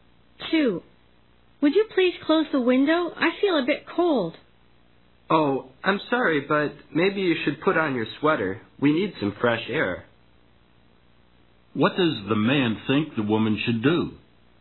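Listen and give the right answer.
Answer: Put on her sweater.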